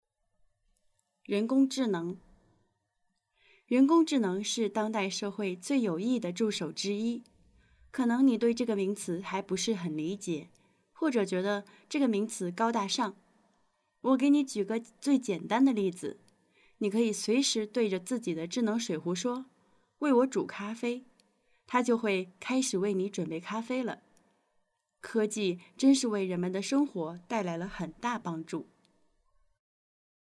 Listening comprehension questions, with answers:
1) 人工智能对大家有帮助吗?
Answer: 有

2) 当你使用智能水壶煮咖啡的时候,你需要做些什么?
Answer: 对智能水壶说,为我煮咖啡

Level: upper intermediate